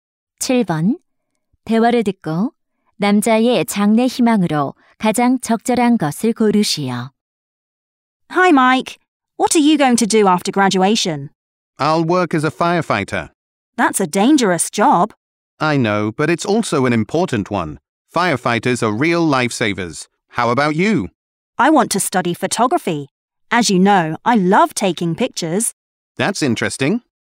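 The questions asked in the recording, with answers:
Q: 대화를 듣고 남자의 장래 희망으로 가장 적절한 것을 고르시오.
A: 소방관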